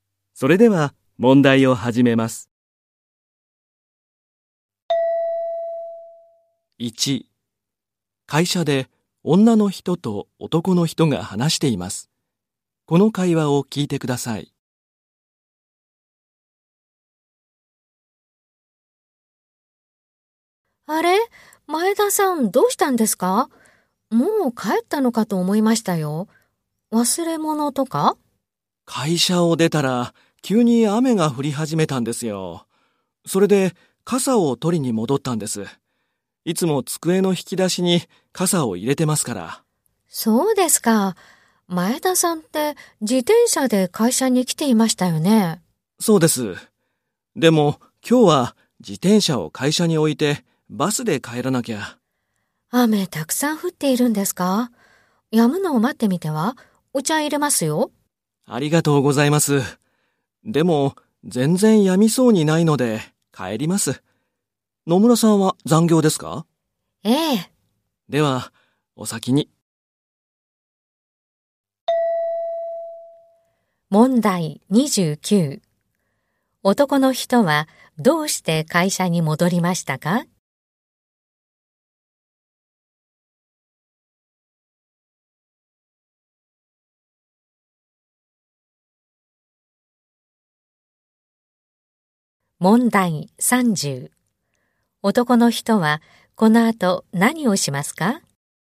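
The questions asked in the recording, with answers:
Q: 男の人はどうして会社に戻りましたか?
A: 傘を取りに戻った

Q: 男の人はこの後何をしますか?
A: バスで帰る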